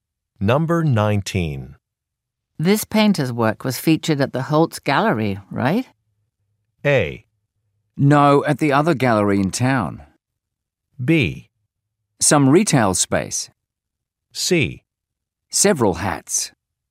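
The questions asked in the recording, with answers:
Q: This painter's work was featured at the Holtz Gallery, right?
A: A: No, at the other gallery in town.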